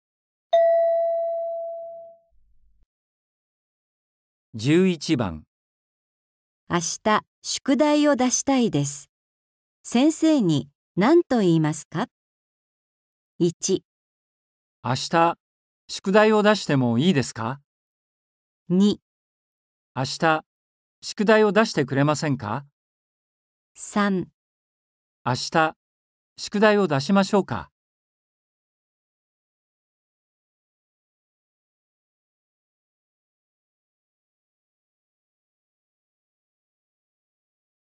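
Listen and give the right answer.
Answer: 1

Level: N4.35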